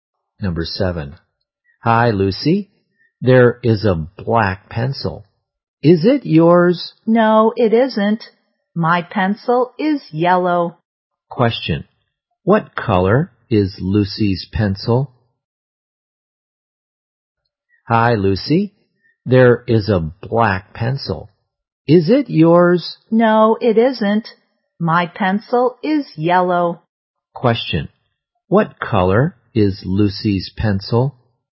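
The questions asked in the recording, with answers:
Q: Question, what color is Lucy's pencil?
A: Yellow.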